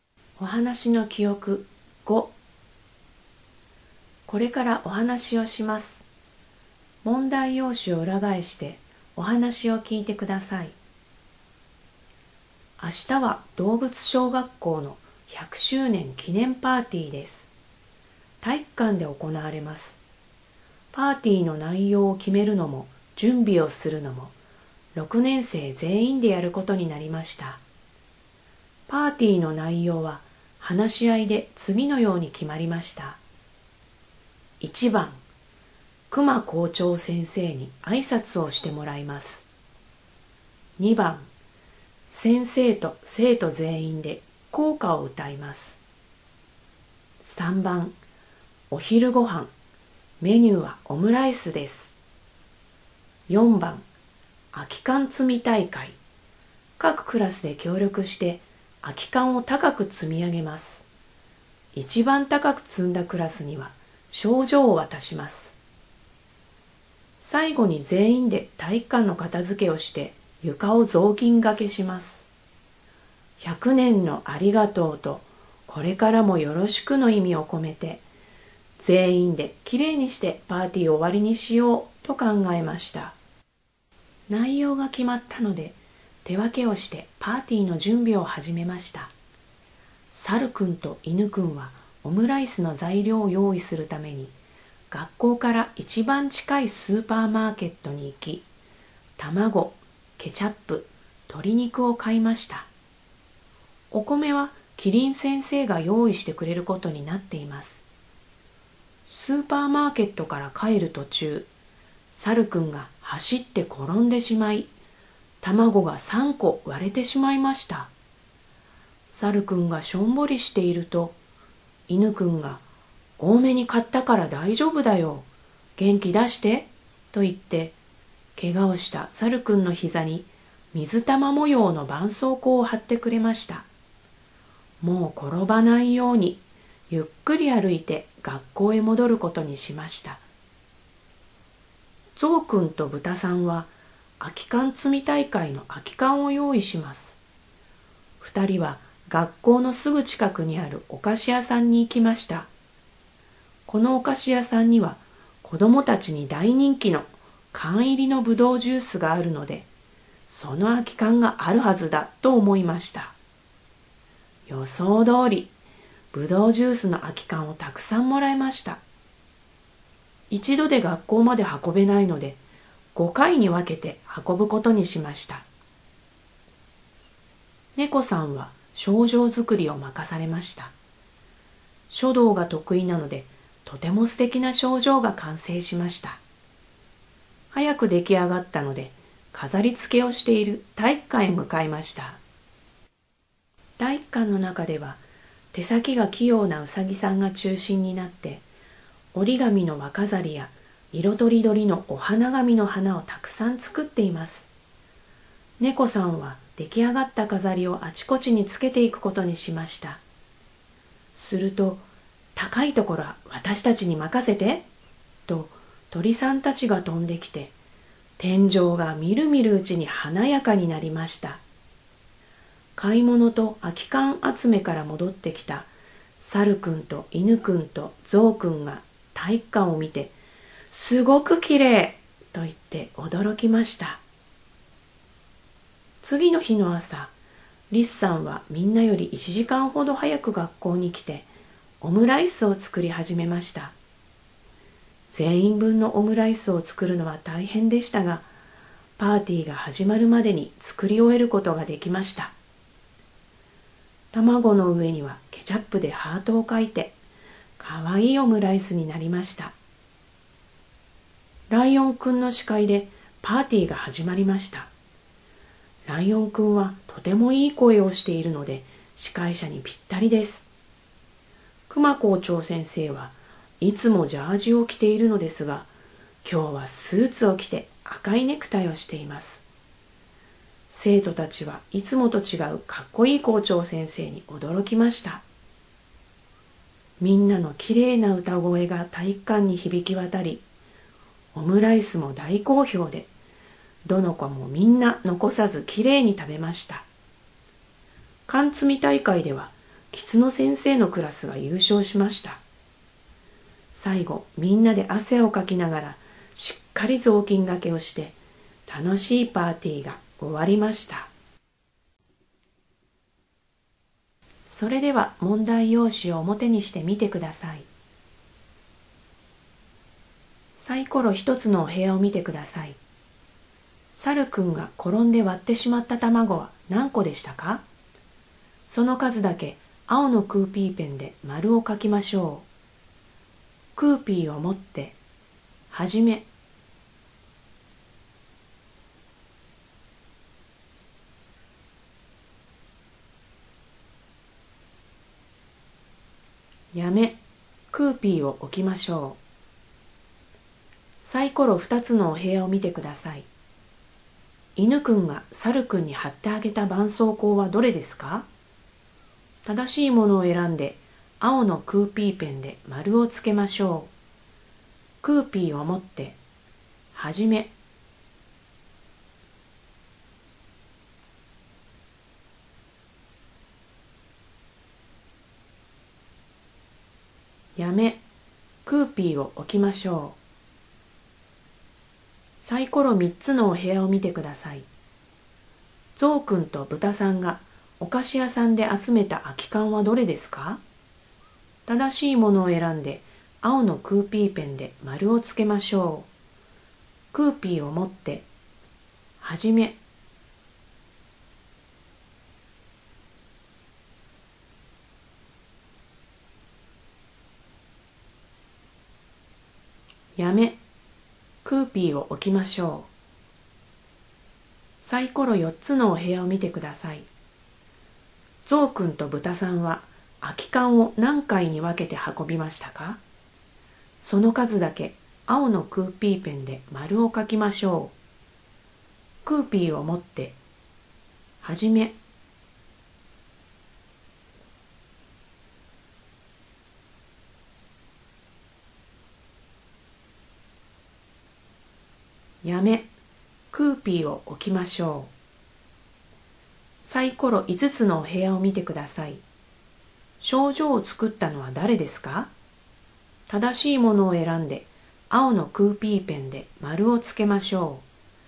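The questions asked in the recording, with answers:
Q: サルくんが転んで割ってしまった卵は何個でしたか?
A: 3個

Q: 犬くんが猿くんに貼ってあげた絆創膏はどれですか?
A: 水玉模様の絆創膏

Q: ゾウくんとブタさんがお菓子屋さんで集めた空き缶はどれですか?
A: ぶどうジュースの空き缶

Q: ゾウくんとブタさんは、空き缶を何回に分けて運びましたか?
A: 5回

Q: 賞状を作ったのは誰ですか?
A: 猫さん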